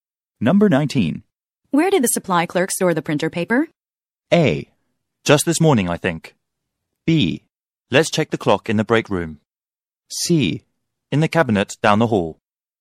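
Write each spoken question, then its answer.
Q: Where did the supply clerk store the printer paper?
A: C: In the cabinet down the hall.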